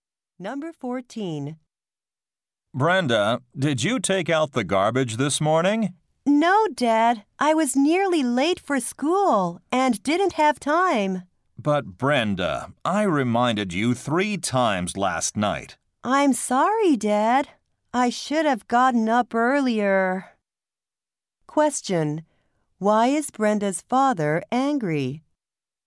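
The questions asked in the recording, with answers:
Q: Why is Brenda's father angry?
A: She didn't take out the garbage.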